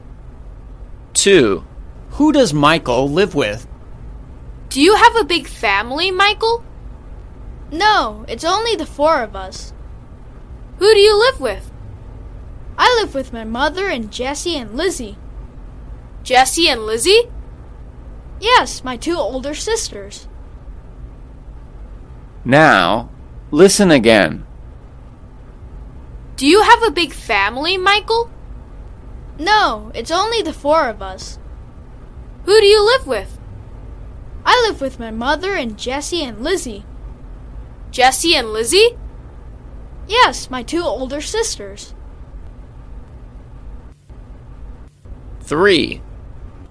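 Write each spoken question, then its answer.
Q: Who does Michael live with?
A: his mother and his two older sisters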